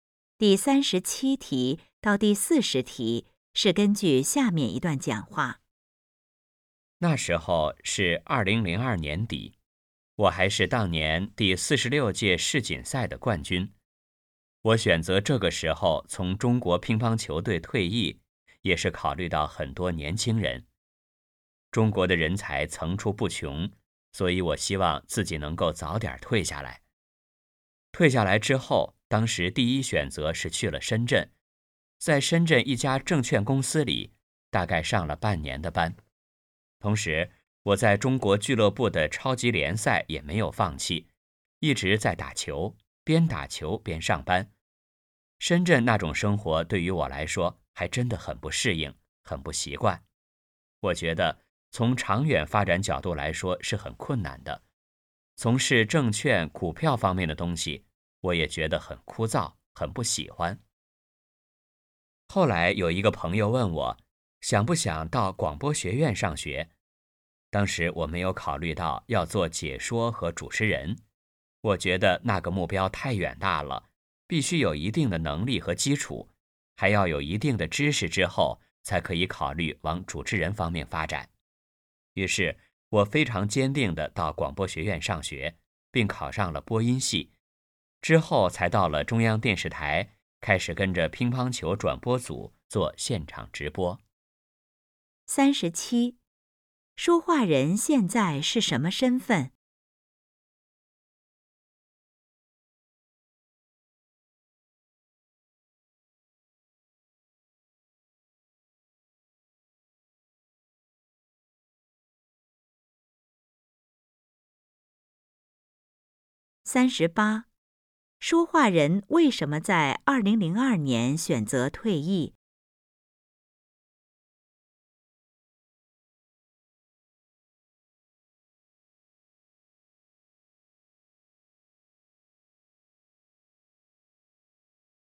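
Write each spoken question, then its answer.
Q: 说话人为什么在2002年选择退役?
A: 为年轻人考虑,中国人才层出不穷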